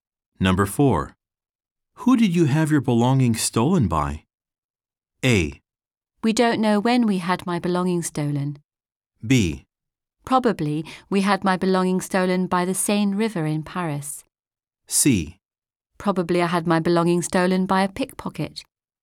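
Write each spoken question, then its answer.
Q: Who did you have your belongings stolen by?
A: C: Probably I had my belongings stolen by a pickpocket.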